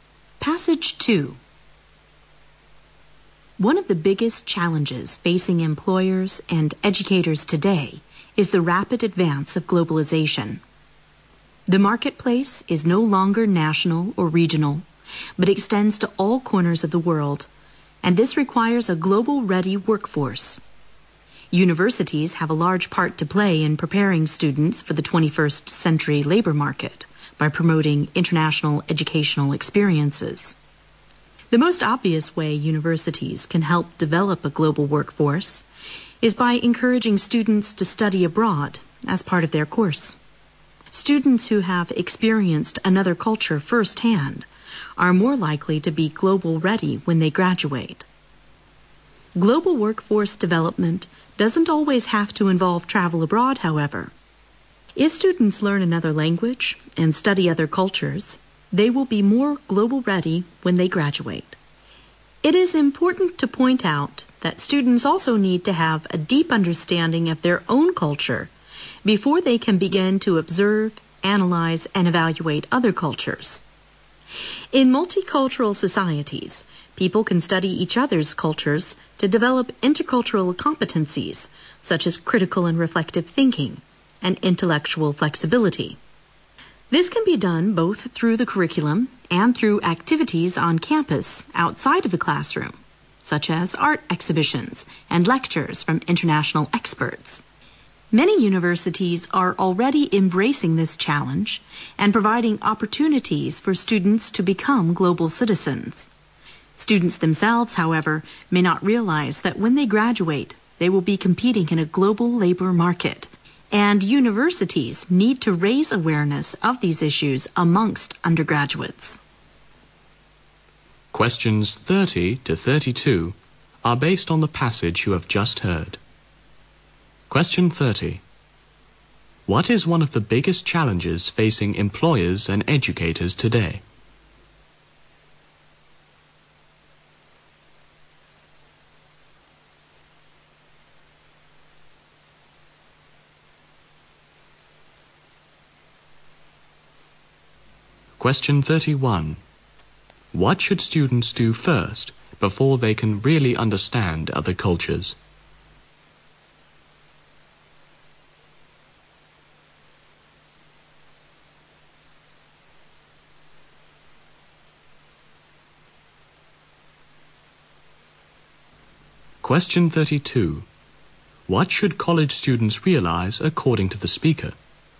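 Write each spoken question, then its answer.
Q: What is one of the biggest challenges facing employers and educators today?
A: The rapid advance of globalization

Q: What should students do first before they can really understand other cultures?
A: Gain a deep understanding of their own culture

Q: What should college students realize according to the speaker?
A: That they will be competing in a global labor market when they graduate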